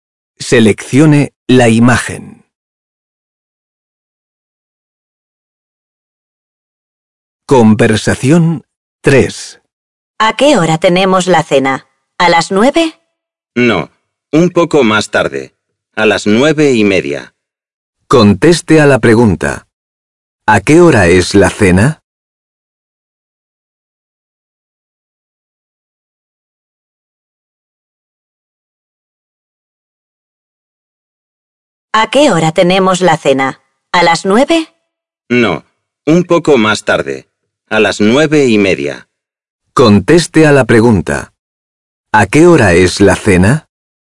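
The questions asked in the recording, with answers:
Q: ¿A qué hora es la cena?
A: A las 9:30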